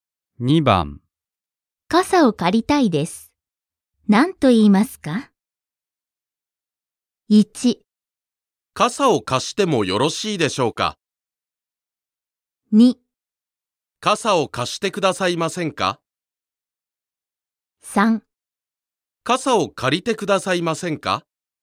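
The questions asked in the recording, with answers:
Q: 傘を借りたいです。何と言いますか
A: 2: 傘を貸してくださいませんか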